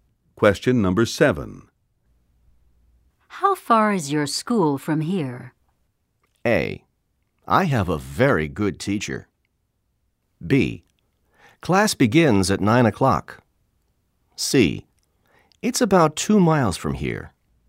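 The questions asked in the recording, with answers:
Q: How far is your school from here?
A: C: It's about 2 miles from here.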